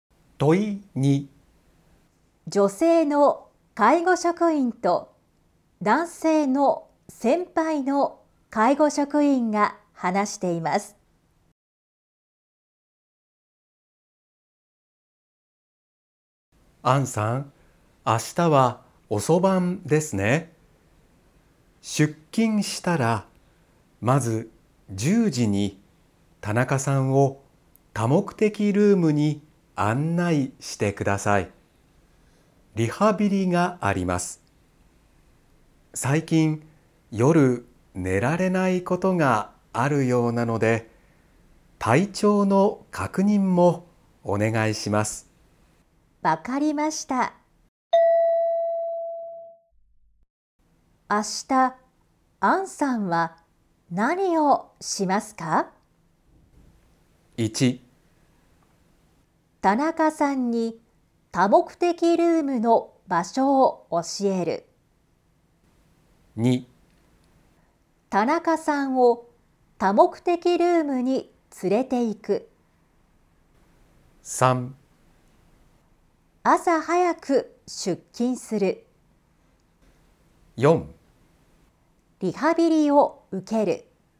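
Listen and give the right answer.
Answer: 2: 田中さんを多目的ルームに連れて行く。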